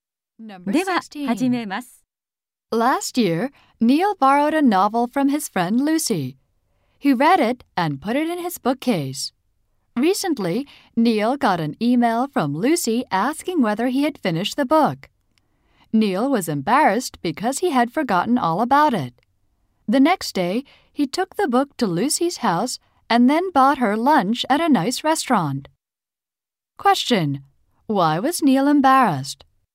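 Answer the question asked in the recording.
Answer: He had forgotten to return Lucy's book.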